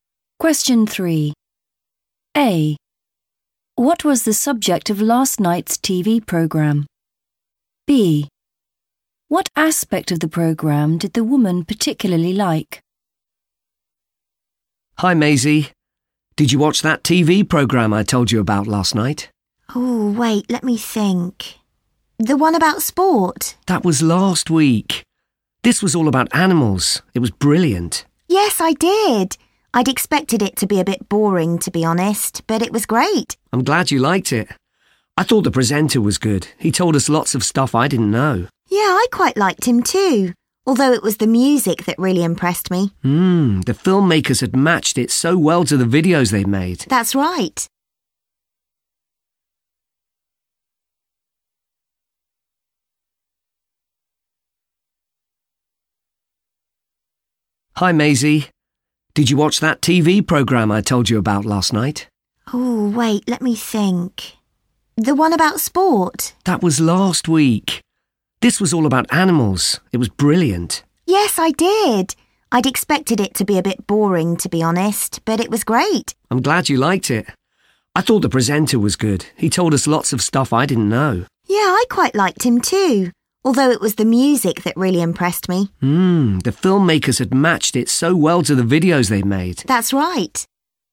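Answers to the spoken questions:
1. animals
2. the music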